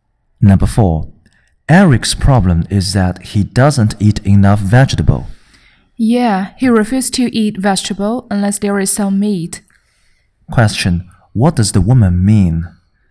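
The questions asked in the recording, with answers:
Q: what does the woman mean?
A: Eric eats vegetables only when there is meat with them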